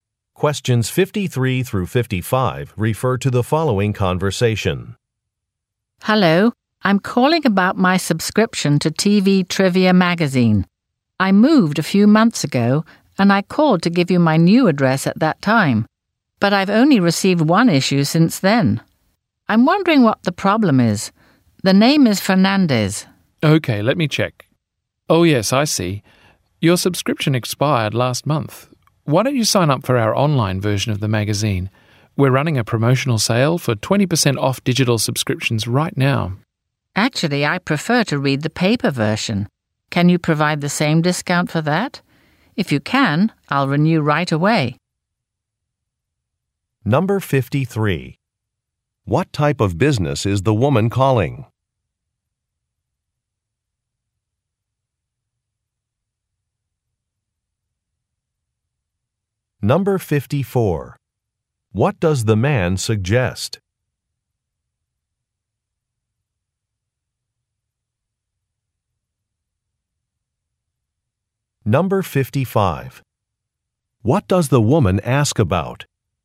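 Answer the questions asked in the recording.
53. A magazine publisher
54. Signing up for the online version of the magazine
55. Whether the discount applies to the paper version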